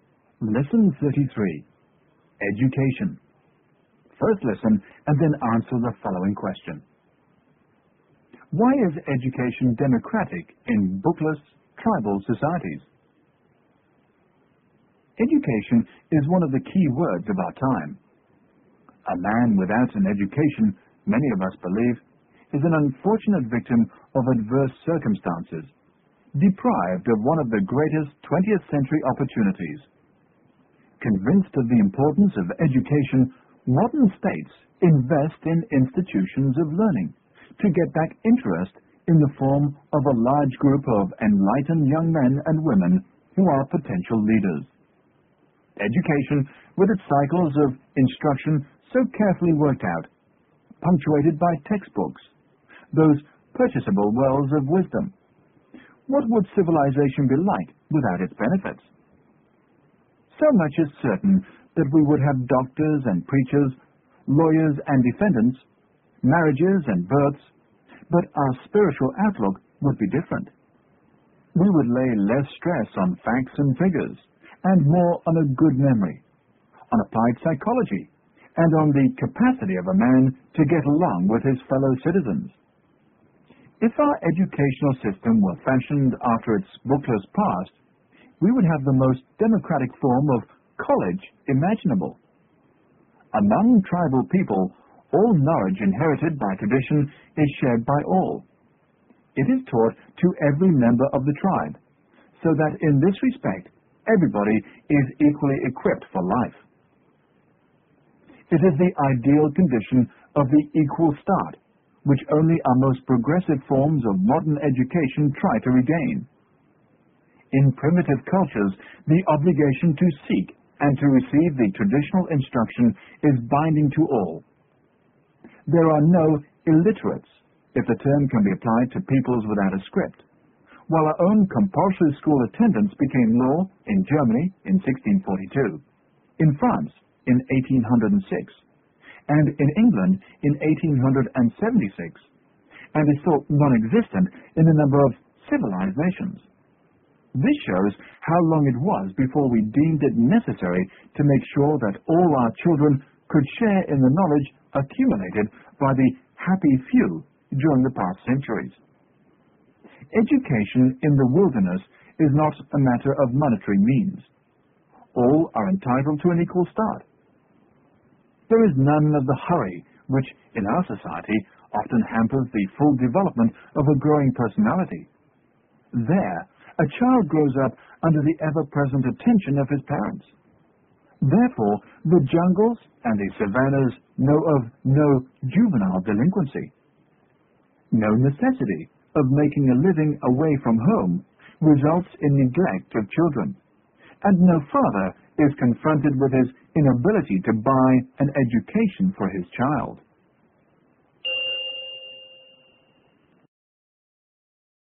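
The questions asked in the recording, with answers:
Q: Why is education democratic in bookless tribal societies?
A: Because all traditional knowledge is shared by all and taught to every member of the tribe, so everyone gets an equal start.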